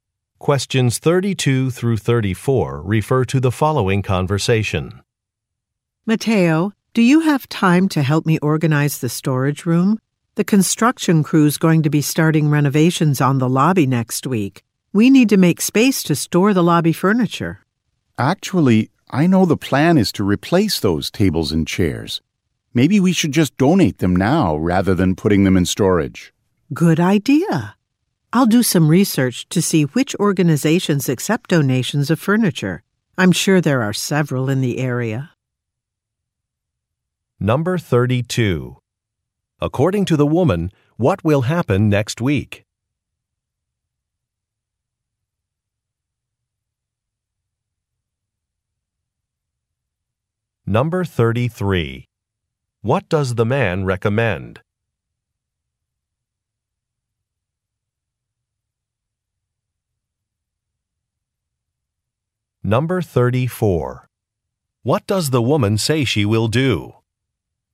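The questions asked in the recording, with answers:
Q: According to the woman, what will happen next week?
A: Renovations on the lobby will begin

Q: What does the man recommend?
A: Donating the lobby furniture

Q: What does the woman say she will do?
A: Research organizations that accept furniture donations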